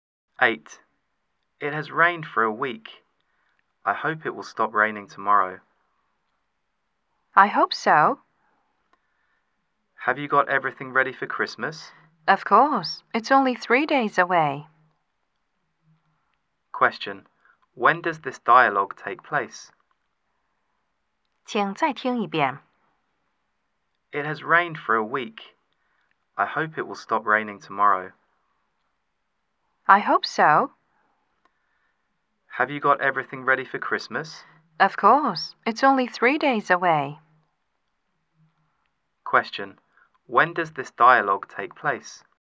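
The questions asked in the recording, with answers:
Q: When does this dialogue take place?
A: On December 22nd, three days before Christmas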